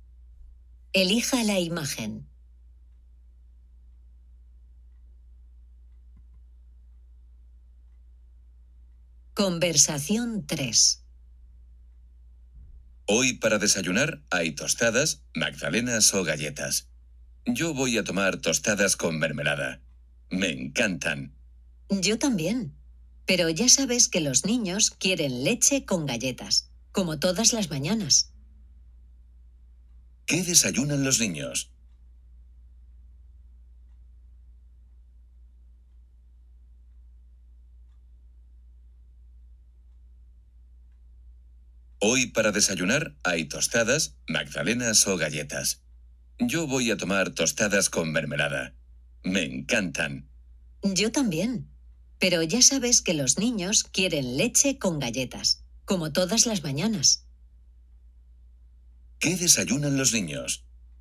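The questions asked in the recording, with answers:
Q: ¿Qué desayunan los niños?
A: Leche con galletas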